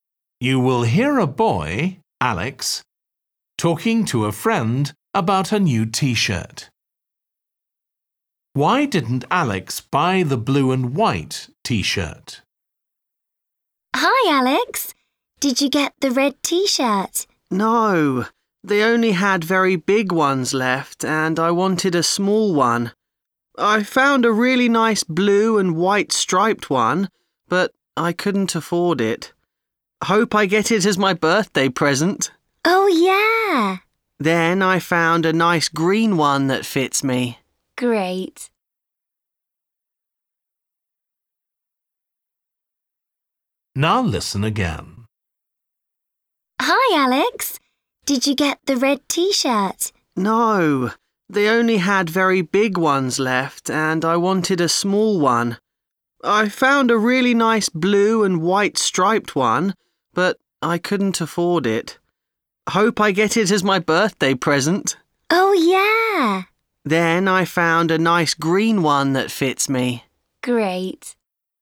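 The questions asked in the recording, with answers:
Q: Why didn't Alex buy the blue and white T-shirt?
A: He couldn't afford it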